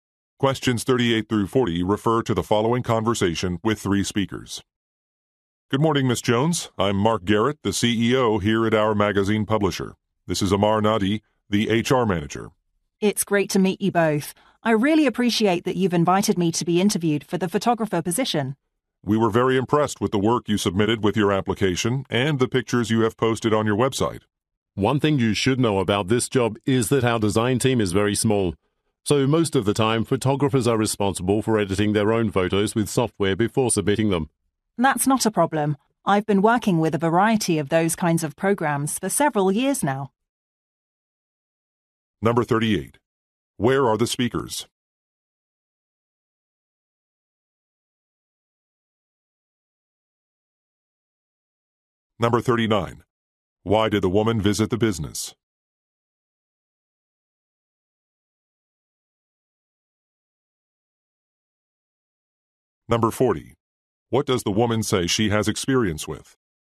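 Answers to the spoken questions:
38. At a magazine publisher
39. For a job interview as a photographer
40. Photo editing software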